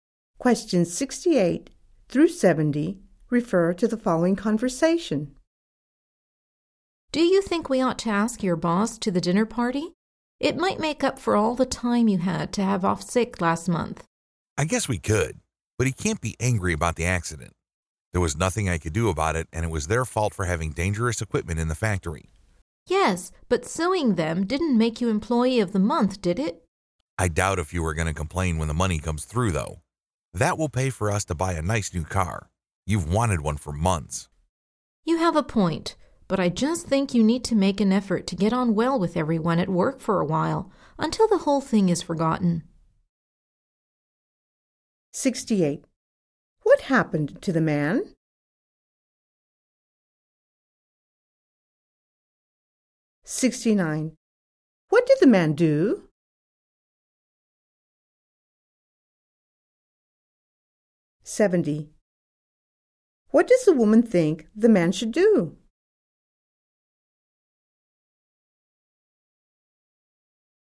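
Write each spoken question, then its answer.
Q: What happened to the man?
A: He had an accident at the factory

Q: What did the man do?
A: He sued the company

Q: What does the woman think the man should do?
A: Make an effort to get on well with everyone at work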